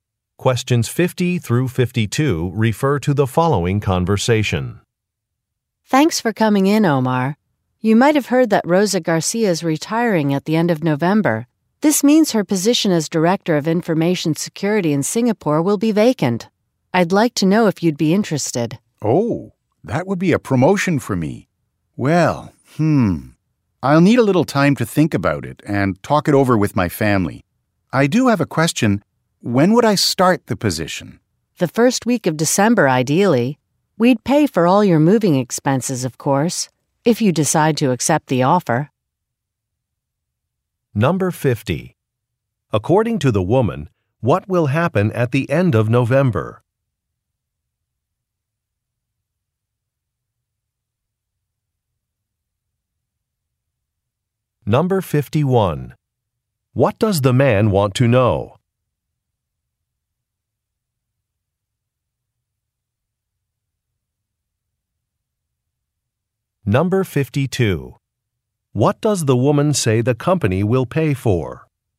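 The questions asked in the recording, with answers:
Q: According to the woman, what will happen at the end of November?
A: Rosa Garcia will retire

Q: What does the man want to know?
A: When he would start the position

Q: What does the woman say the company will pay for?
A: Moving expenses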